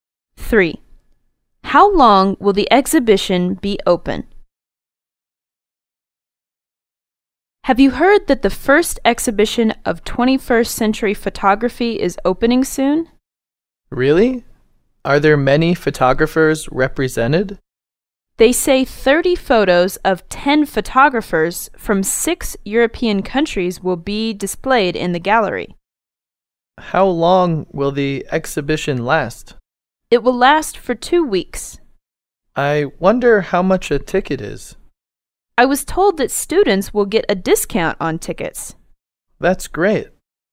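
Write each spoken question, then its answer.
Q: How long will the exhibition be open?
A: For 2 weeks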